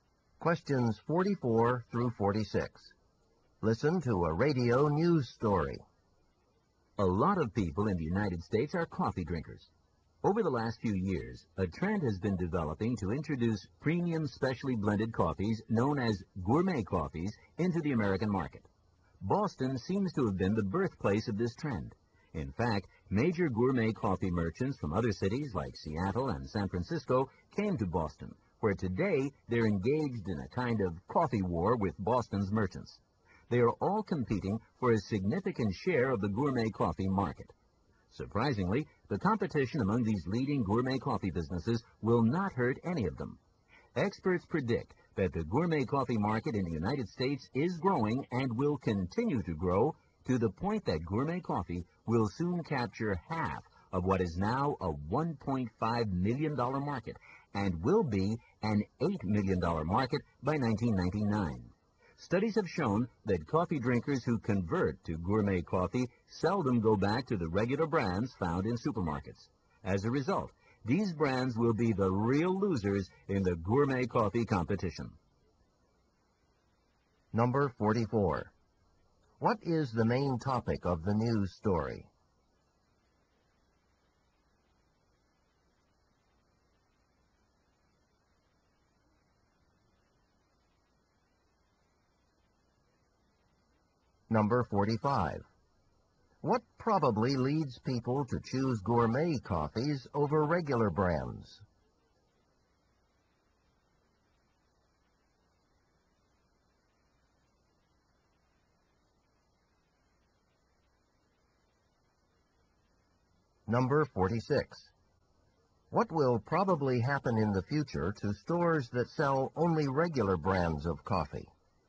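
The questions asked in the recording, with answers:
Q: What is the main topic of the news story?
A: Competition in the gourmet coffee market

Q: What will probably happen in the future to stores that sell only regular brands of coffee?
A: They will lose business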